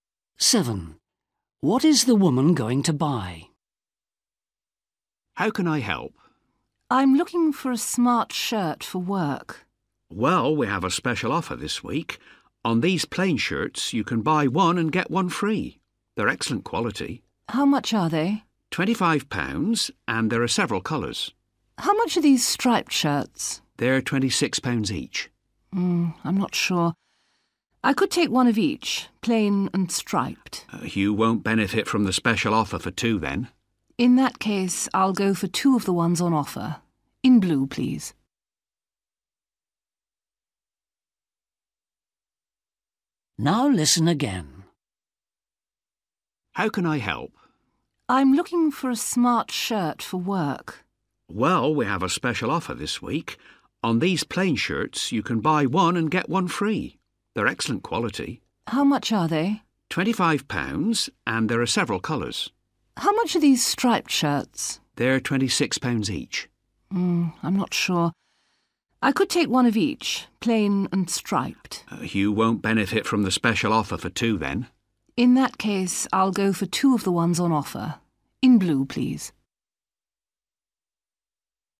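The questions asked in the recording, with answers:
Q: What is the woman going to buy?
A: two plain blue shirts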